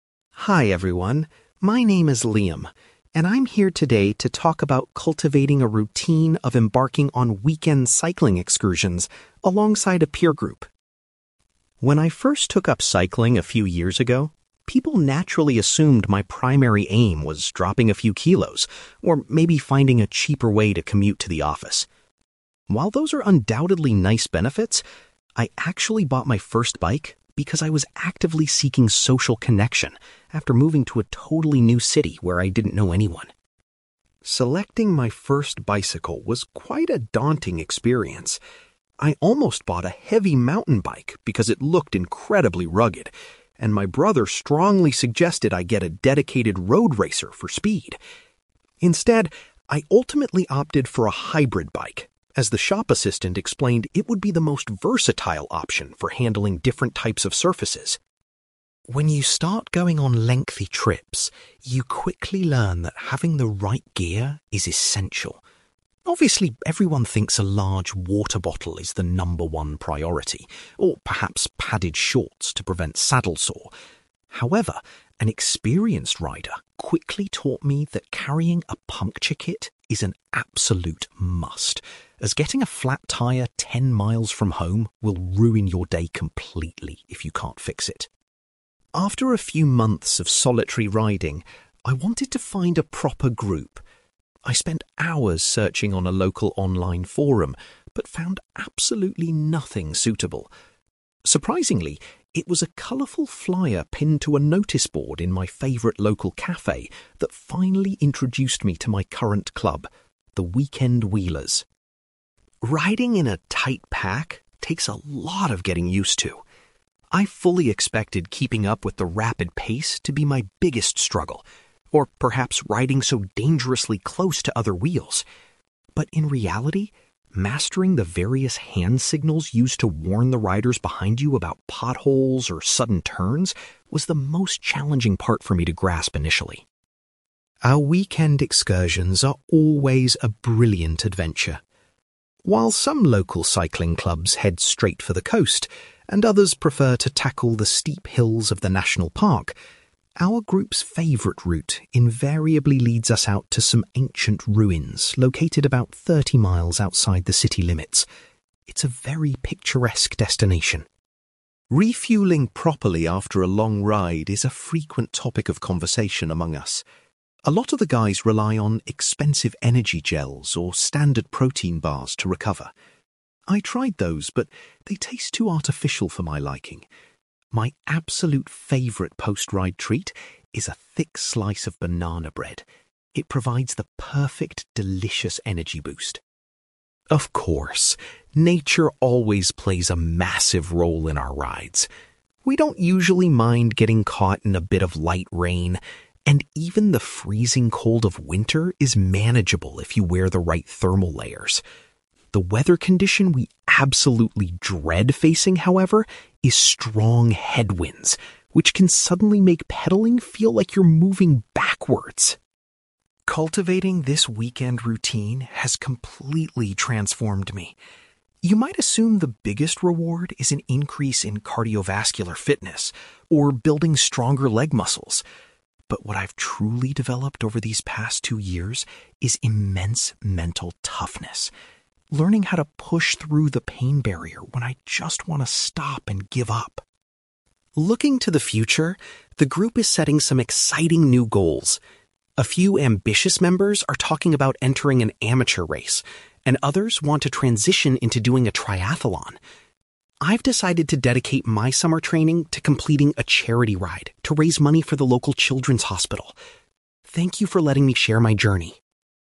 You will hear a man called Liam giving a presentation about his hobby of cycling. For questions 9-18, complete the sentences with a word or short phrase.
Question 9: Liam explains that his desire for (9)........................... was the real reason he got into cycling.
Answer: social connection

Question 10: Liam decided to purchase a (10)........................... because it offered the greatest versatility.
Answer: hybrid bike

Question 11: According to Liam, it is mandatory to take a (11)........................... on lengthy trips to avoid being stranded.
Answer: puncture kit

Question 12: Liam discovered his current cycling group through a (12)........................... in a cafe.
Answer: notice board

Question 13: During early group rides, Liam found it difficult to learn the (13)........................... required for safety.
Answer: hand signals

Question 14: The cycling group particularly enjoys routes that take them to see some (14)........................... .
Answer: ancient ruins

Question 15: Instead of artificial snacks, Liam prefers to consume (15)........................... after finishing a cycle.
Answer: banana bread

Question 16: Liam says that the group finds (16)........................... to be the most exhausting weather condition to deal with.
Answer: strong headwinds

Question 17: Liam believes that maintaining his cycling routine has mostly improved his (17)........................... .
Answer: mental toughness

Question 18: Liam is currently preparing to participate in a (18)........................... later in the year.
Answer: charity ride

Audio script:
Liam: Hi everyone, my name is Liam, and I'm here today to talk about cultivating a routine of embarking on weekend cycling excursions alongside a peer group.
When I first took up cycling a few years ago, people naturally assumed my primary aim was dropping a few kilos, or maybe finding a cheaper way to commute to the office. While those are undoubtedly nice benefits, I actually bought my first bike because I was actively seeking social connection after moving to a totally new city where I didn't know anyone.
Selecting my first bicycle was quite a daunting experience. I almost bought a heavy mountain bike because it looked incredibly rugged, and my brother strongly suggested I get a dedicated road racer for speed. Instead, I ultimately opted for a hybrid bike, as the shop assistant explained it would be the most versatile option for handling different types of surfaces.
When you start going on lengthy trips, you quickly learn that having the right gear is essential. Obviously, everyone thinks a large water bottle is the number one priority, or perhaps padded shorts to prevent saddle sore. However, an experienced rider quickly taught me that carrying a puncture kit is an absolute must, as getting a flat tyre ten miles from home will ruin your day completely if you can't fix it.
After a few months of solitary riding, I wanted to find a proper group. I spent hours searching on a local online forum, but found absolutely nothing suitable. Surprisingly, it was a colourful flyer pinned to a notice board in my favourite local cafe that finally introduced me to my current club, the 'Weekend Wheelers'.
Riding in a tight pack takes a lot of getting used to. I fully expected keeping up with the rapid pace to be my biggest struggle, or perhaps riding so dangerously close to other wheels. But in reality, mastering the various hand signals used to warn the riders behind you about potholes or sudden turns was the most challenging part for me to grasp initially.
Our weekend excursions are always a brilliant adventure. While some local cycling clubs head straight for the coast, and others prefer to tackle the steep hills of the national park, our group's favourite route invariably leads us out to some ancient ruins located about thirty miles outside the city limits. It's a very picturesque destination.
Refuelling properly after a long ride is a frequent topic of conversation among us. A lot of the guys rely on expensive energy gels or standard protein bars to recover. I tried those, but they taste too artificial for my liking. My absolute favourite post-ride treat is a thick slice of banana bread; it provides the perfect, delicious energy boost.
Of course, nature always plays a massive role in our rides. We don't usually mind getting caught in a bit of light rain, and even the freezing cold of winter is manageable if you wear the right thermal layers. The weather condition we absolutely dread facing, however, is strong headwinds, which can suddenly make pedalling feel like you're moving backwards!
Cultivating this weekend routine has completely transformed me. You might assume the biggest reward is an increase in cardiovascular fitness or building stronger leg muscles. But what I've truly developed over these past two years is immense mental toughness; learning how to push through the pain barrier when I just want to stop and give up.
Looking to the future, the group is setting some exciting new goals. A few ambitious members are talking about entering an amateur race, and others want to transition into doing a triathlon. I've decided to dedicate my summer training to completing a charity ride to raise money for the local children's hospital. Thank you for letting me share my journey!

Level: B2